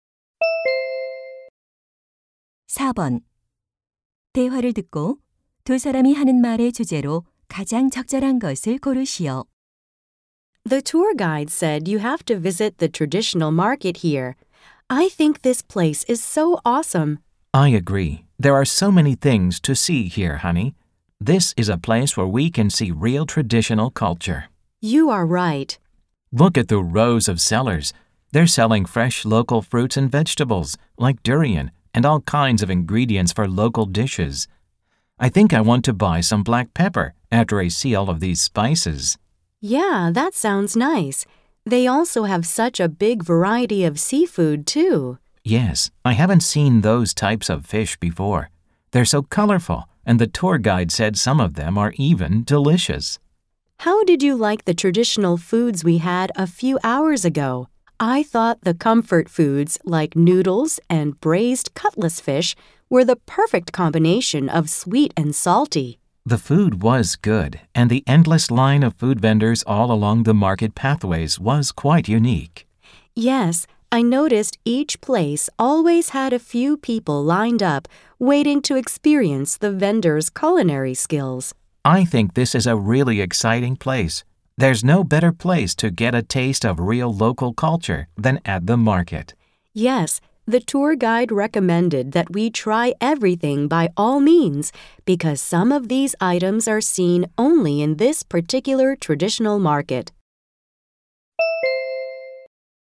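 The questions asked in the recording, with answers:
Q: 대화를 듣고 두 사람이 하는 말의 주제로 가장 적절한 것을 고르시오.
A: 전통 시장에서 경험하는 현지 문화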